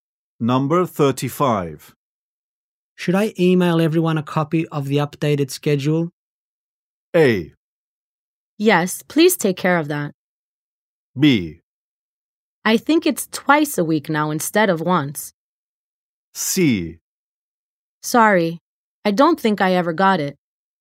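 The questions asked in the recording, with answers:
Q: Should I email everyone a copy of the updated schedule?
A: A: Yes, please take care of that.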